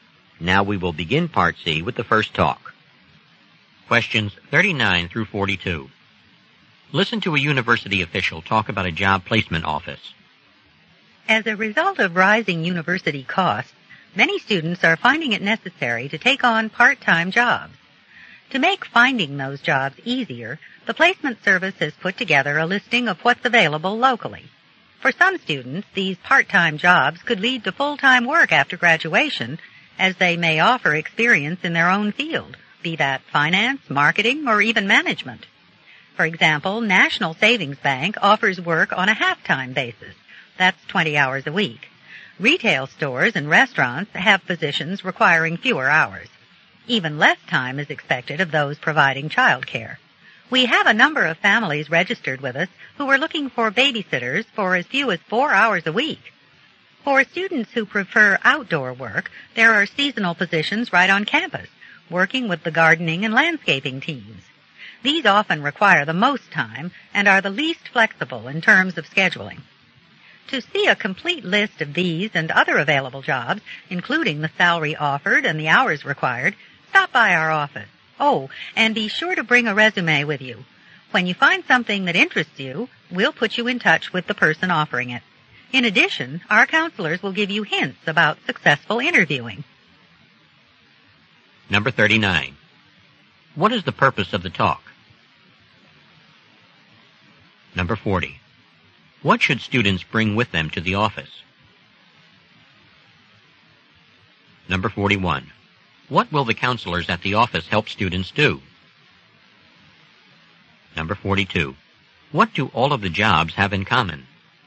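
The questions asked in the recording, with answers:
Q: What is the purpose of the talk?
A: To tell students about part-time jobs available through the placement service

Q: What should students bring with them to the office?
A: A resume

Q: What will the counselors at the office help students do?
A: Interview successfully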